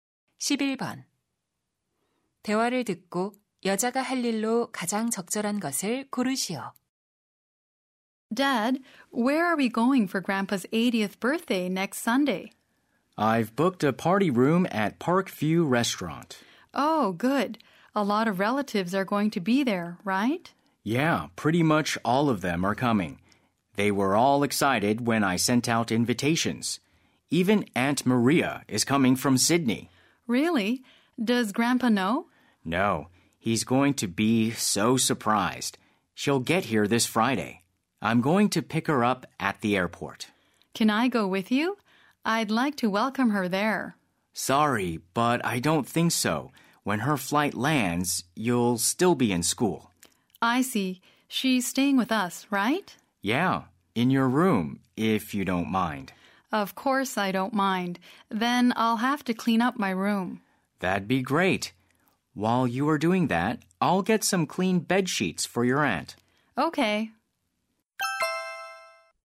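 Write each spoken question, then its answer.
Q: 대화를 듣고 여자가 할 일로 가장 적절한 것을 고르시오.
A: 자기 방 청소하기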